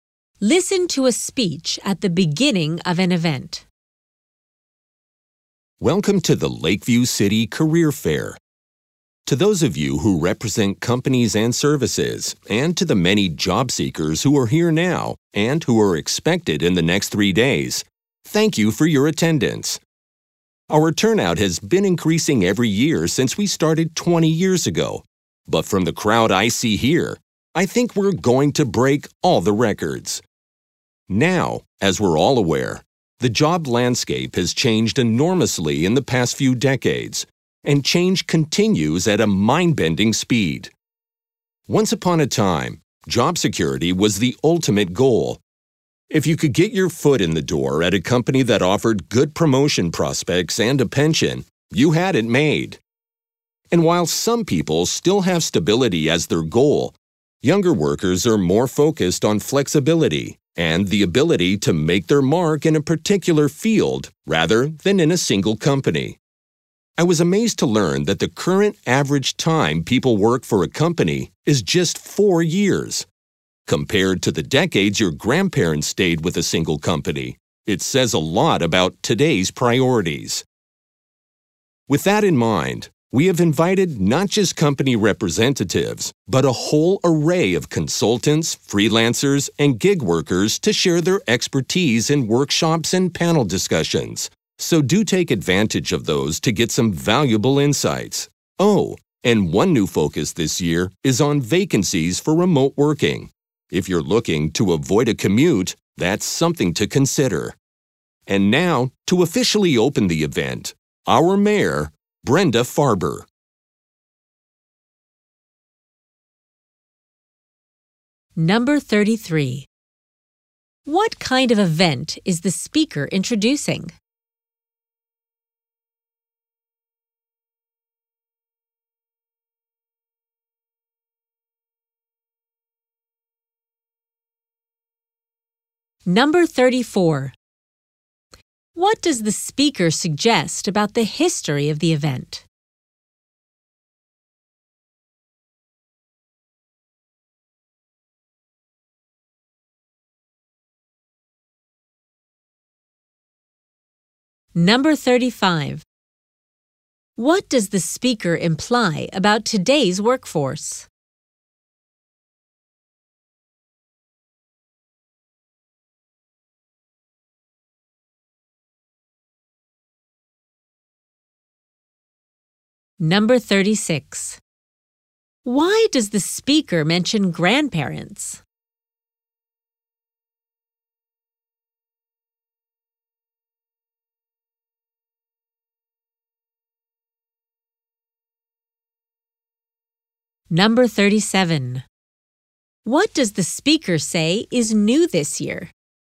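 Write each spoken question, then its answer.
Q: What kind of event is the speaker introducing?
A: A career fair

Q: What does the speaker suggest about the history of the event?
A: Attendance has grown every year for 20 years

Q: Why does the speaker mention grandparents?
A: To contrast how long people used to stay with one company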